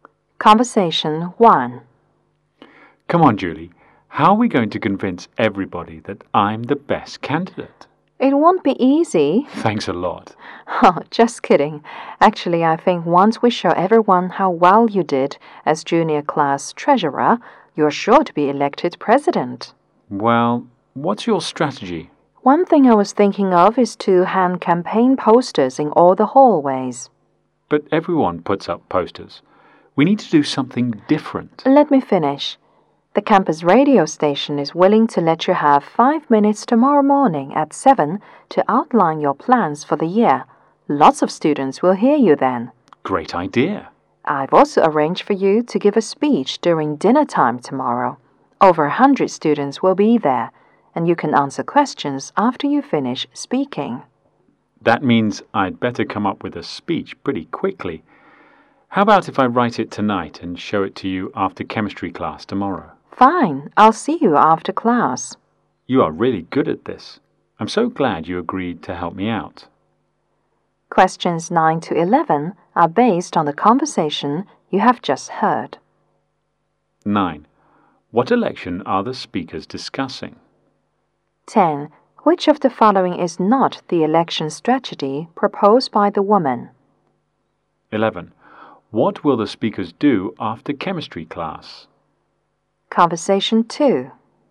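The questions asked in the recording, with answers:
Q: What election are the speakers discussing?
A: The election for student class president.

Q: What will the speakers do after chemistry class?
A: Meet to look over the man's speech.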